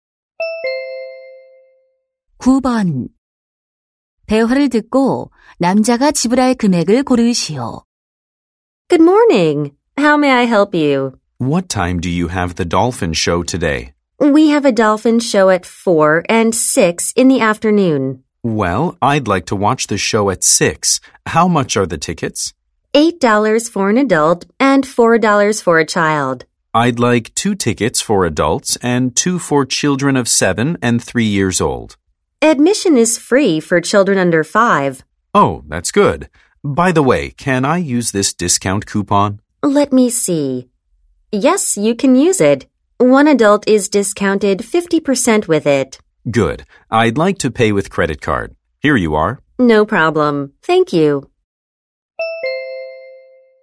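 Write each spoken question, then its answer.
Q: 대화를 듣고 남자가 지불할 금액을 고르시오.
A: $16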